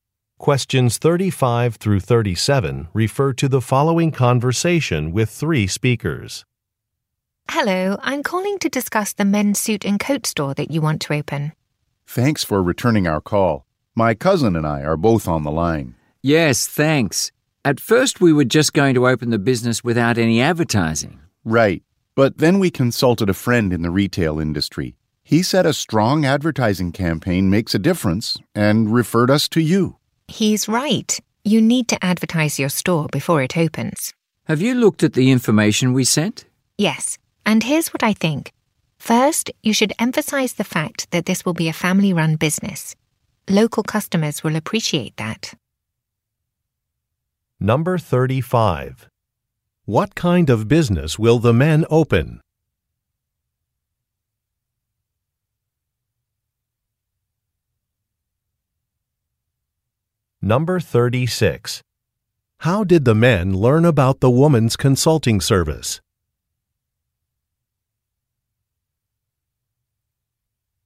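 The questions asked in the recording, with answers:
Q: What kind of business will the men open?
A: A men's suit and coat store

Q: How did the men learn about the woman's consulting service?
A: A friend in the retail industry referred them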